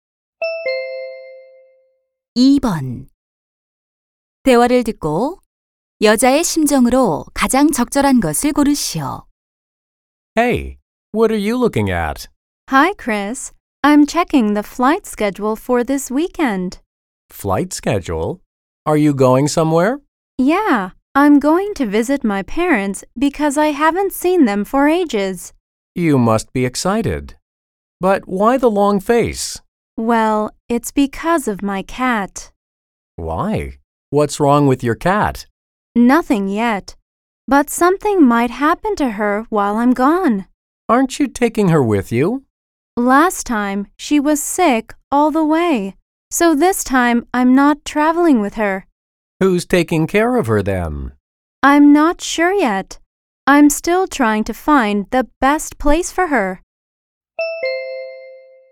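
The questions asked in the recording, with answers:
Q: 대화를 듣고 여자의 심정으로 가장 적절한 것을 고르시오.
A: 걱정스러움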